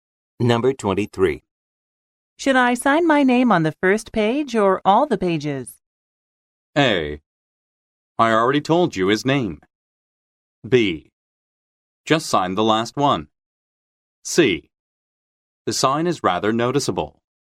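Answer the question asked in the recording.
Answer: B: Just sign the last one.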